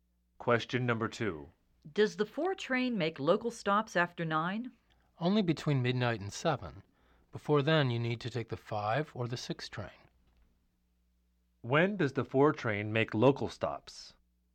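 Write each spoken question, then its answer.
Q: When does the 4 train make local stops?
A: Only between midnight and 7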